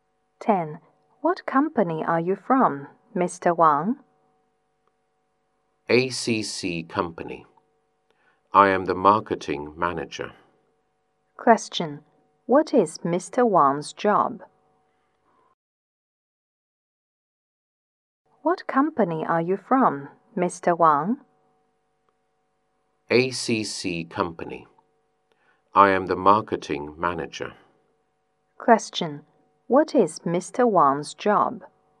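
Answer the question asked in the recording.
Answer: Marketing manager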